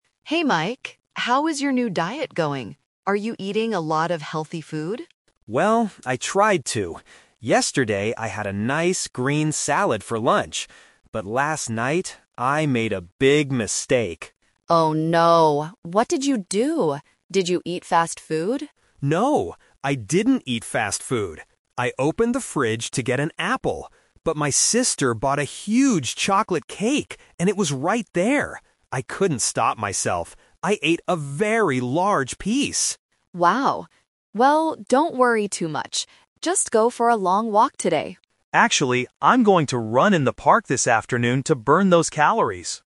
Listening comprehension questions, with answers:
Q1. What did Mike eat last night?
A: A piece of chocolate cake.

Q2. What did Mike want to get when he first opened the fridge?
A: An apple.

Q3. What is Mike going to do this afternoon?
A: Run in the park.

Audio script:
Sarah: Hey Mike, how is your new diet going? Are you eating a lot of healthy food?
Mike: Well, I tried to. Yesterday, I had a nice green salad for lunch. But last night... I made a big mistake.
Sarah: Oh no. What did you do? Did you eat fast food?
Mike: No, I didn't eat fast food. I opened the fridge to get an apple. But my sister bought a huge chocolate cake, and it was right there. I couldn't stop myself. I ate a very large piece!
Sarah: Wow. Well, don't worry too much. Just go for a long walk today.